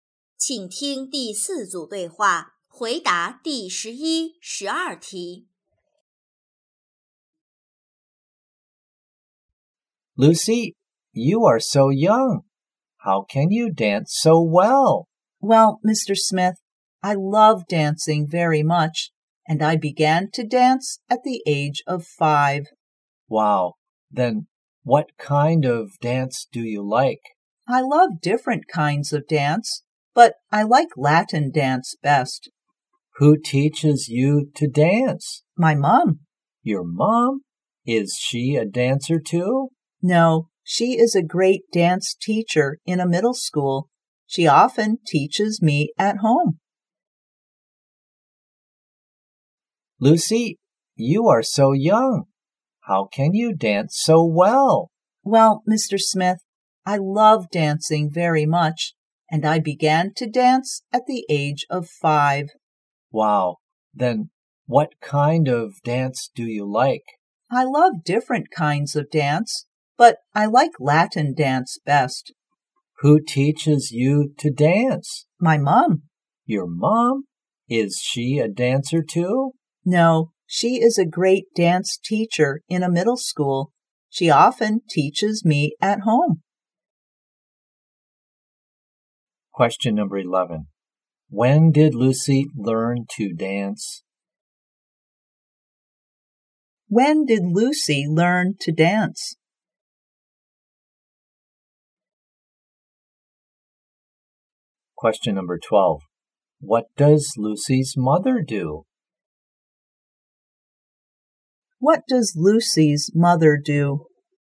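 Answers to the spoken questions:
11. At the age of 5.
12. She is a dance teacher in a middle school.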